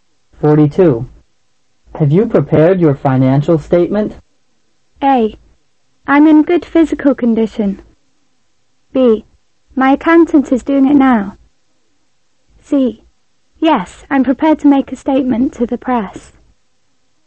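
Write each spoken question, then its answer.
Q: Have you prepared your financial statement?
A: B: My accountant is doing it now.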